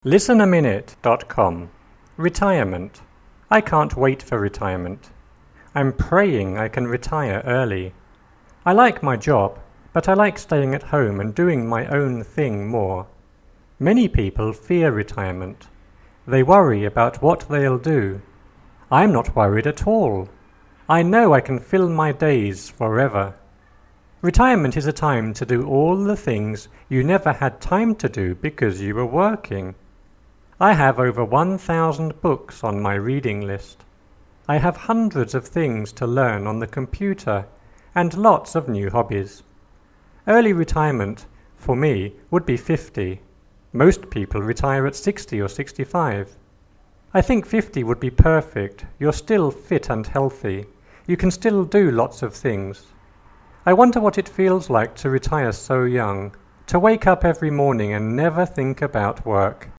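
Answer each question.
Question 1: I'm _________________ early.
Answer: praying I can retire

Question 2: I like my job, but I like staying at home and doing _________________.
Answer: my own thing more

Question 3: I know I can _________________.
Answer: fill my days forever

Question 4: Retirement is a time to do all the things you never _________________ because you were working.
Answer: had time to do

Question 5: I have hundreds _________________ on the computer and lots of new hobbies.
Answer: of things to learn

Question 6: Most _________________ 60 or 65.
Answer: people retire at

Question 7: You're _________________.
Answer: still fit and healthy

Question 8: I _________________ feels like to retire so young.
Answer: wonder what it

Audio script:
I can't wait for retirement. I'm praying I can retire early. I like my job, but I like staying at home and doing my own thing more. Many people fear retirement. 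They worry about what they'll do. I'm not worried at all. I know I can fill my days forever. Retirement is a time to do all the things you never had time to do because you were working. I have over 1,000 books on my reading list. I have hundreds of things to learn on the computer and lots of new hobbies.
I have rnudshed of things to learn on the computer and lots of new oisebhb. Early retirement for me would be 50. Most people retire at 60 or 65. I think 50 would be retpcfe. You're still fit and thyealh. You can still do lots of things. I wonder what it feels like to retire so young. To wake up every nrmniog and never think about work.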